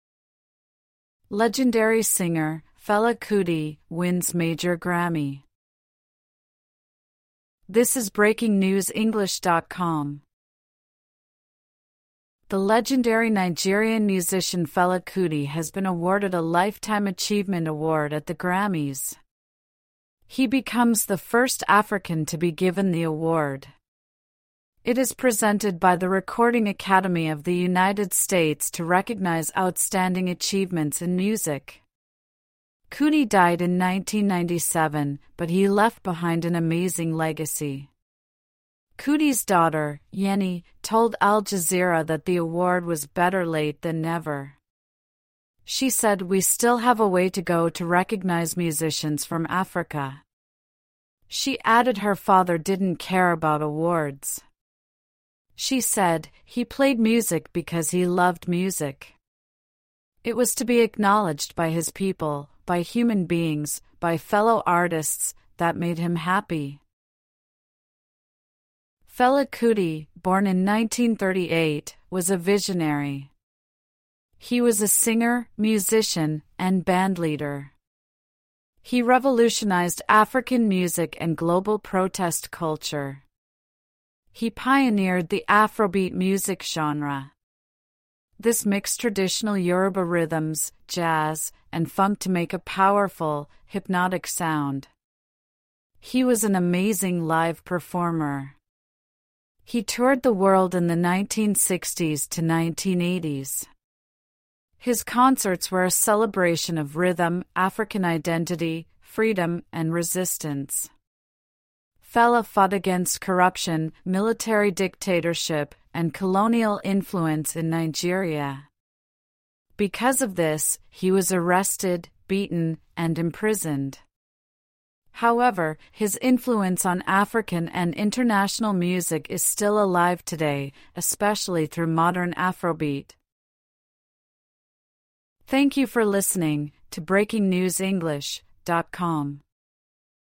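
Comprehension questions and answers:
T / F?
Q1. Fela is the second African to receive the Lifetime Achievement Award.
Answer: F

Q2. The award is presented by a recording academy in Switzerland.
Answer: F

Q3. The article says Fela left behind an amazing legacy.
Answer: T

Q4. Fela's daughter said Fela played music because it was relaxing.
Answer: F

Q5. The article says Fela revolutionized global protest culture.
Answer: T

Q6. Fela combined many kinds of music to make a hypnotic sound.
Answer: T

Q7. Fela was beaten and put in prison because of his political actions.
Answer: T

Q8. The article says Fela's influence on music is disappearing.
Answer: F

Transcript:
Legendary singer Fela Kuti wins major Grammy
Fela Kuti record
The legendary Nigerian musician Fela Kuti has been awarded a Lifetime Achievement Award at the Grammys. He becomes the first African to be given the award. It is presented by the Recording Academy of the United States to recognise outstanding achievements in music. 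Kuti died in 1997, but he left behind an amazing legacy. Kuti's daughter, Yeni, told Al Jazeera that the award was "better late than never". She said "we still have a way to go" to recognise musicians from Africa. She added her father didn't care about awards. She said: "He played music because he loved music. It was to be acknowledged by his people – by human beings, by fellow artists - that made him happy."
Fela Kuti, born in 1938, was a visionary. He was a singer, musician, and bandleader. He revolutionized African music and global protest culture. He pioneered the Afrobeat music genre. This mixed traditional Yoruba rhythms, jazz, and funk to make a powerful, hypnotic sound. He was an amazing live performer. He toured the world in the 1960s to 1980s. His concerts were a celebration of rhythm, African identity, freedom, and resistance. Fela fought against corruption, military dictatorship, and colonial influence in Nigeria. 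Because of this, he was arrested, beaten, and imprisoned. However, his influence on African and international music is still alive today, especially through modern Afrobeat.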